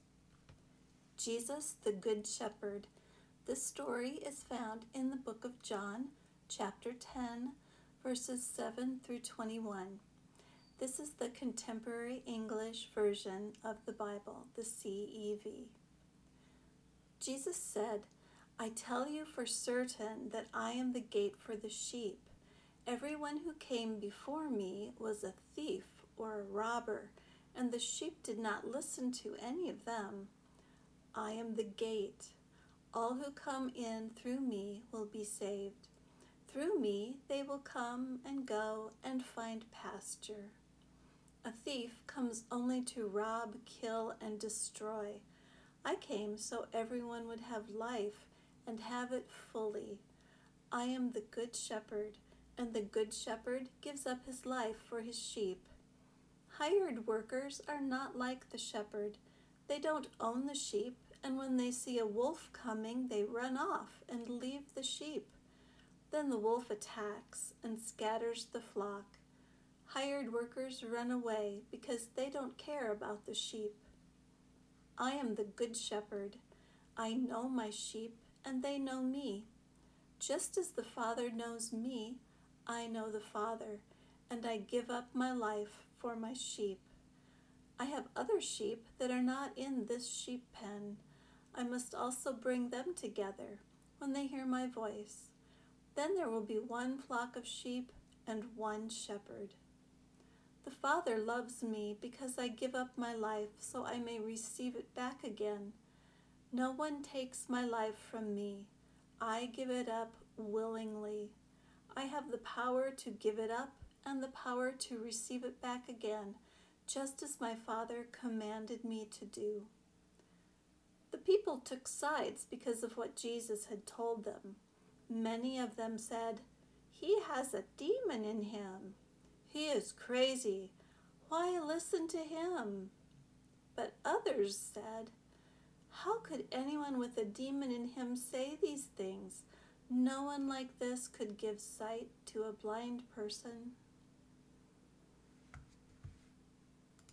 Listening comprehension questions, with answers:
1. What is meant by a "good shepherd?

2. How are hired workers different from the shepherd?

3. If Jesus is the shepherd, who are the sheep that find pasture?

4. What did the people think of what Jesus said?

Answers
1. A good shepherd cares about his sheep very much and is willing to give up his life for his sheep (like Jesus did for his people).
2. Hired workers don't care about the sheep and run away when a wolf attacks the flock.
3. The sheep are people who believe in Jesus, and those who believe in Jesus will be saved.
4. People were divided in their opinions.

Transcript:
Jesus the Good Shepherd
John 10:7-21 CEV
Jesus said:
I tell you for certain that I am the gate for the sheep. Everyone who came before me was a thief or a robber, and the sheep did not listen to any of them. All who come in through me will be saved. Through me they will come and go and find pasture.
A thief comes only to rob, kill, and destroy. I came so everyone would have life, and have it fully. I am the good shepherd, and the good shepherd gives up his life for his sheep. Hired workers are not like the shepherd. They don't own the sheep, and when they see a wolf coming, they run off and leave the sheep. Then the wolf attacks and scatters the flock. Hired workers run away because they don't care about the sheep.
I know my sheep, and they know me. Just as the Father knows me, I know the Father, and I give up my life for my sheep. I have other sheep that are not in this sheep pen. I must also bring them together, when they hear my voice. Then there will be one flock of sheep and one shepherd.
The Father loves me, because I give up my life, so I may receive it back again. No one takes my life from me. I give it up willingly! I have the power to give it up and the power to receive it back again, just as my Father commanded me to do.
The people took sides because of what Jesus had told them. Many of them said, "He has a demon in him! He is crazy! Why listen to him?"
But others said, "How could anyone with a demon in him say these things? No one like this could give sight to a blind person!

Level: Intermediate